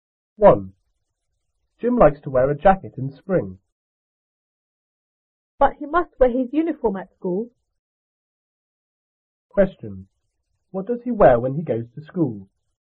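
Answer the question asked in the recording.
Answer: His uniform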